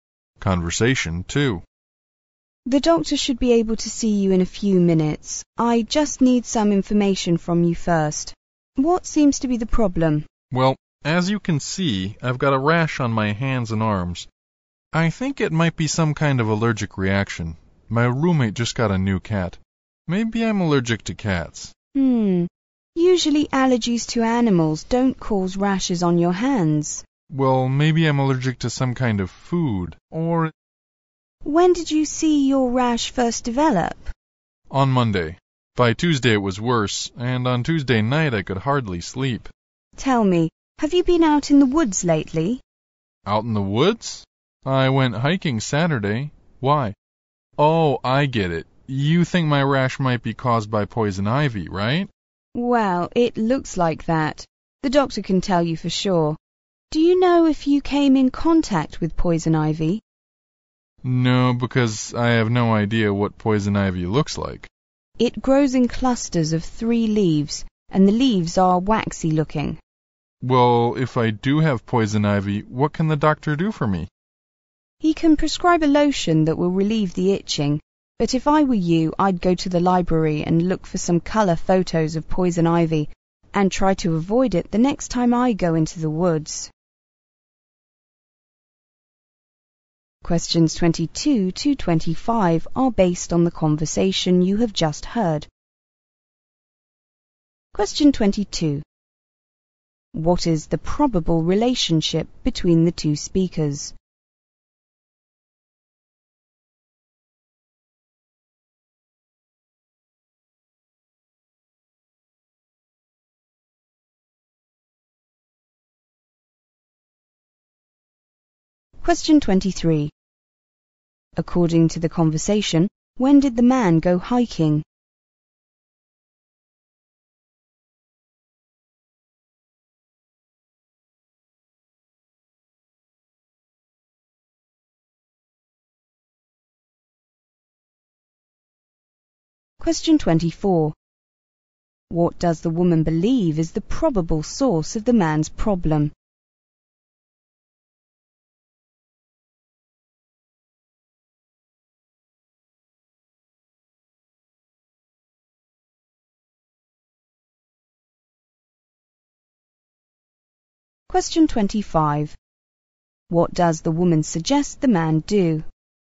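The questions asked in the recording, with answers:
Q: What is the probable relationship between the two speakers?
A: Nurse and patient

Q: According to the conversation, when did the man go hiking?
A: On Saturday

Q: What does the woman believe is the probable source of the man's problem?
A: Poison ivy

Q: What does the woman suggest the man do?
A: Look at color photos of poison ivy in the library and avoid it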